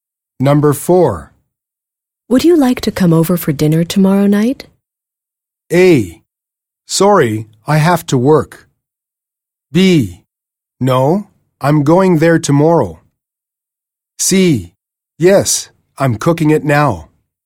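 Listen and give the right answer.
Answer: A: Sorry, I have to work.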